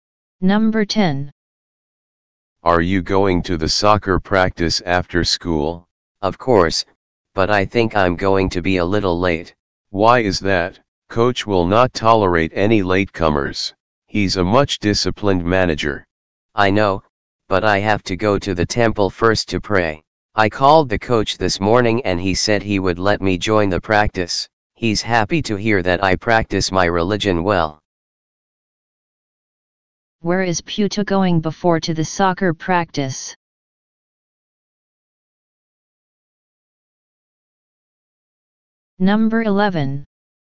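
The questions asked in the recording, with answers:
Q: Where is Pyuta going before to the soccer practice?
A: To the temple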